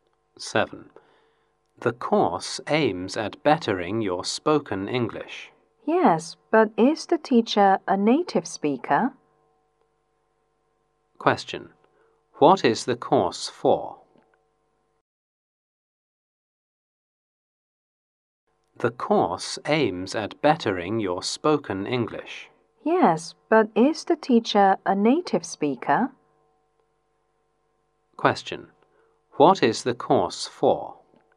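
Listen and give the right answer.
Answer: To improve spoken English.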